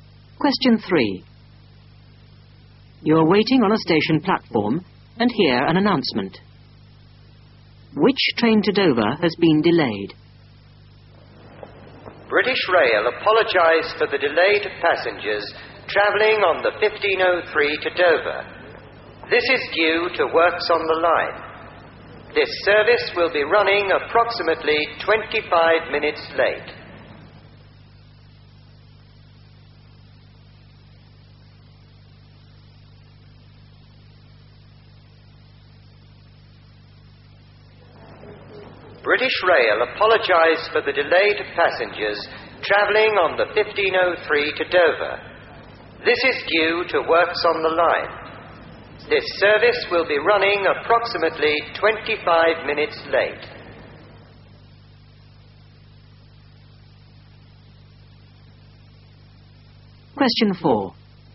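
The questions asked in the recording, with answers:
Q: Which train to Dover has been delayed?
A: The 15:03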